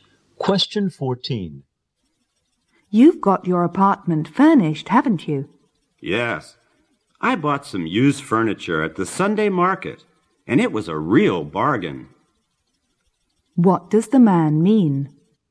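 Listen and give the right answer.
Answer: He bought used furniture cheaply at the Sunday market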